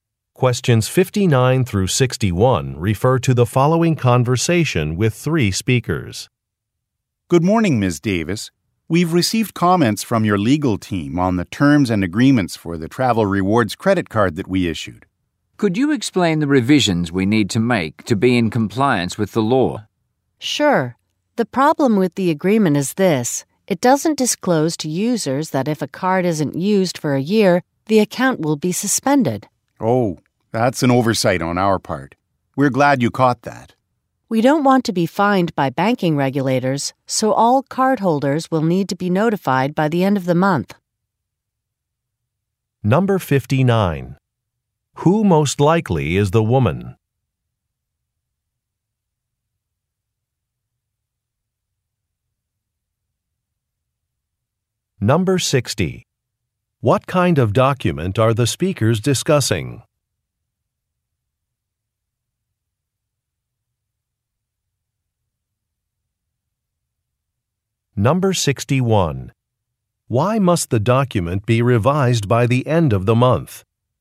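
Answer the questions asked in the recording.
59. A lawyer
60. A credit card agreement
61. To avoid fines from banking regulators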